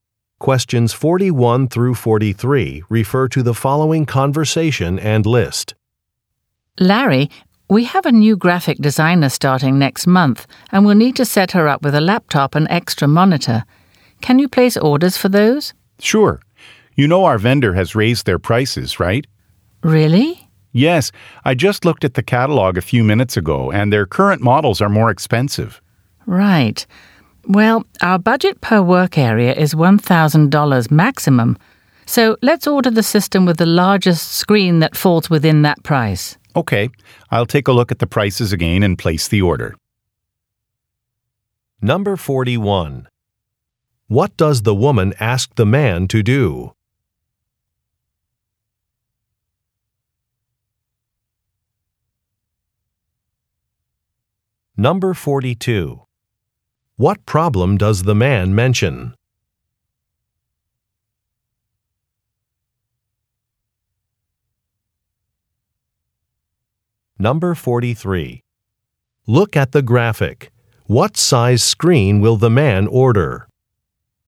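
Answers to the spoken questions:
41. Order a laptop and an extra monitor for a new graphic designer
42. The vendor has raised its prices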